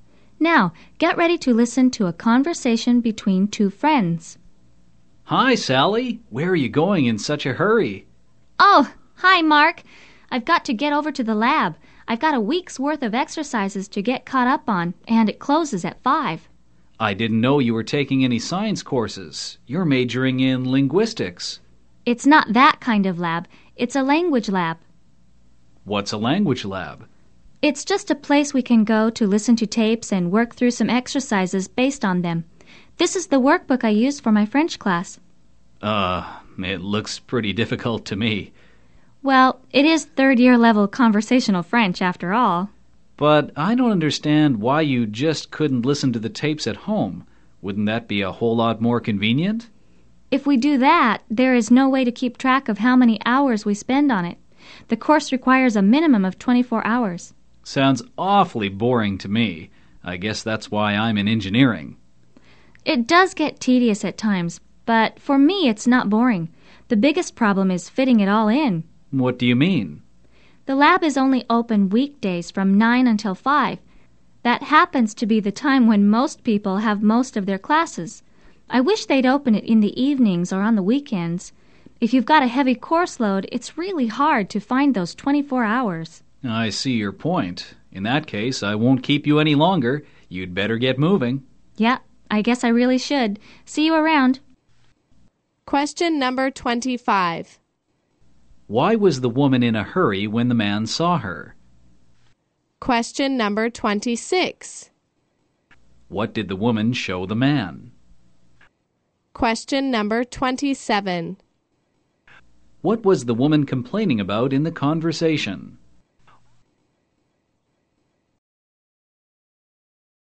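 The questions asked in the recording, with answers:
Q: Why was the woman in a hurry when the man saw her?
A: She had to get to the language lab before it closed at 5 to catch up on a week of exercises.

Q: What did the woman show the man?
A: The workbook she used for her French class.

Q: What was the woman complaining about in the conversation?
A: The lab is only open on weekdays from 9 to 5, so it is hard to fit in the 24 required hours.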